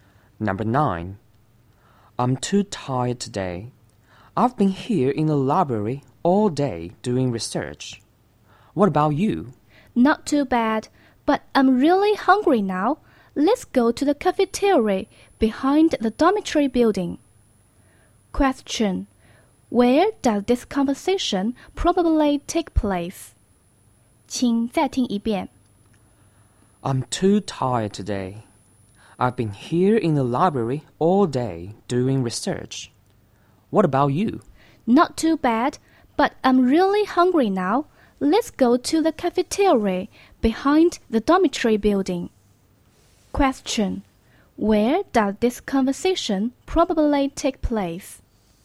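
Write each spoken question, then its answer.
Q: Question.Where does this conversation probably take place?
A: In the library (at a school or university)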